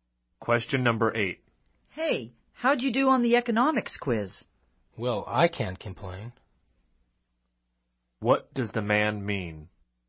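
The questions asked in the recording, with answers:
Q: What does the man mean?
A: He did fairly well on the quiz.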